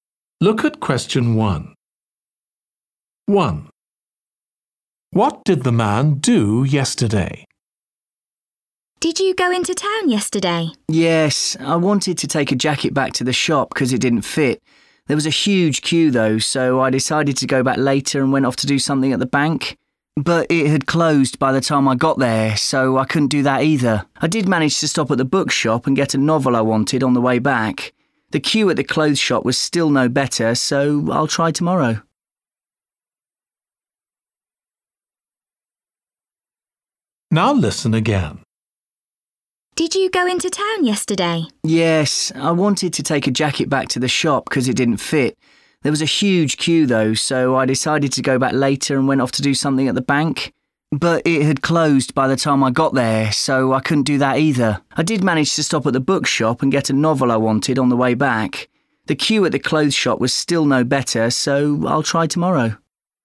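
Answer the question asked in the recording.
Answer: He bought a novel at the bookshop.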